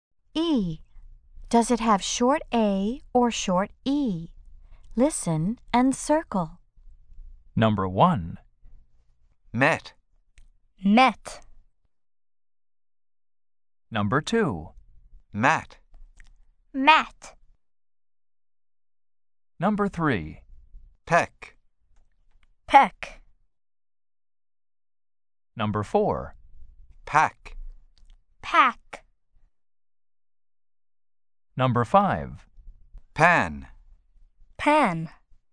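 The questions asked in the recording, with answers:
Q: Does it have short A or short E?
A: short E (met)

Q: Does it have short A or short E?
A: short A (mat)

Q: Does it have short A or short E?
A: short E (peck)

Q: Does it have short A or short E?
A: short A (pack)

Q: Does it have short A or short E?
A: short A (pan)

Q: Does it have short A or short E?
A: short E (pen)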